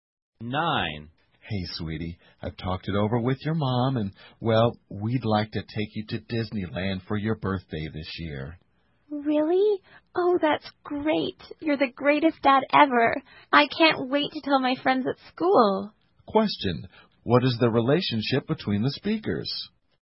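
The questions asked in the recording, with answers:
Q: what is the relationship between the speakers?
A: Father and child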